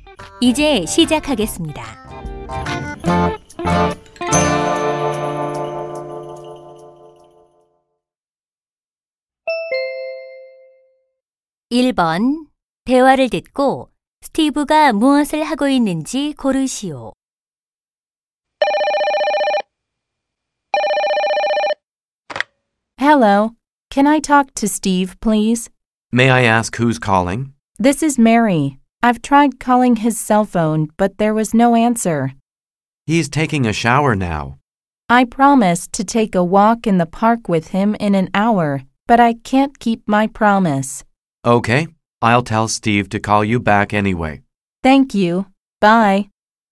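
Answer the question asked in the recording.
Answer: 샤워하고 있다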